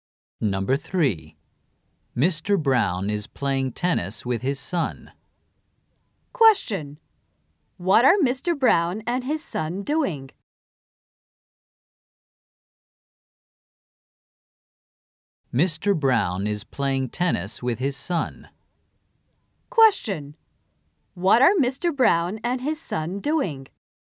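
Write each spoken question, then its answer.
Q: What are Mr. Brown and his son doing?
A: They are playing tennis.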